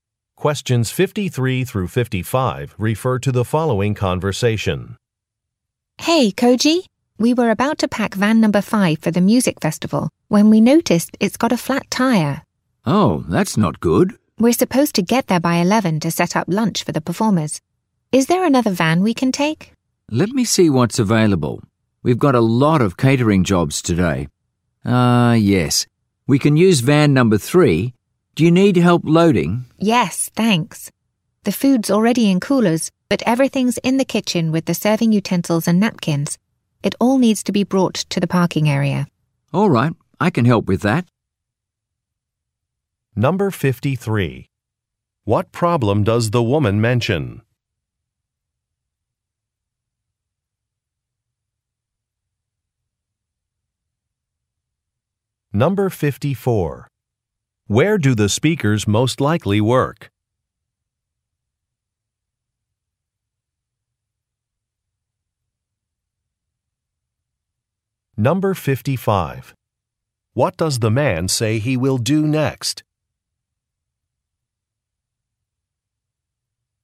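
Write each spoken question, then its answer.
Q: What problem does the woman mention?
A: A van has a flat tire

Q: Where do the speakers most likely work?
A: At a catering company

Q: What does the man say he will do next?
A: Help load the van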